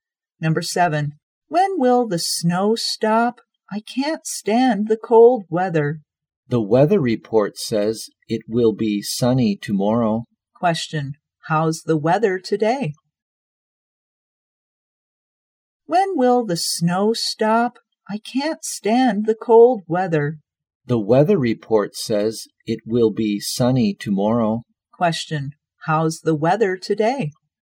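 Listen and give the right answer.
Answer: Snowy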